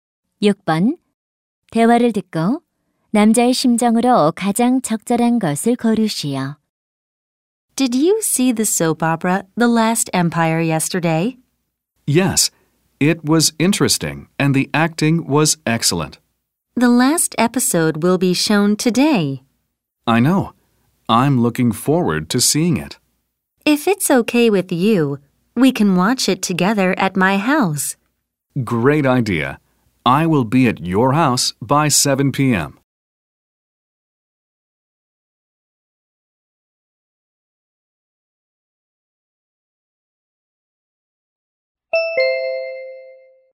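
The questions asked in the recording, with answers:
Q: 대화를 듣고 남자의 심정으로 가장 적절한 것을 고르시오.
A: 기대됨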